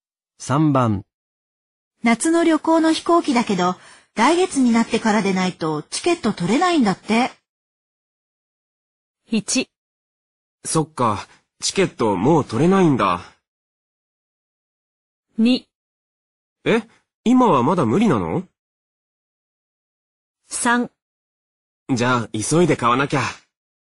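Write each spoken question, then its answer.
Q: 夏の旅行の飛行機だけど、来月になってからでないとチケット取れないんだって。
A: 2: え、今はまだ無理なの?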